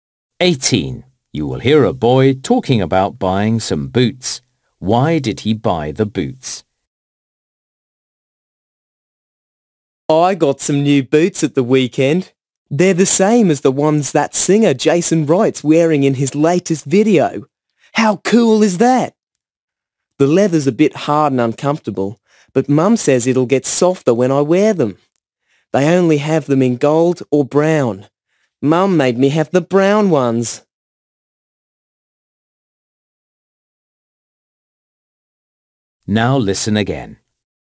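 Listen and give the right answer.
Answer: They are the same as the ones the singer Jason Wright wears in his video.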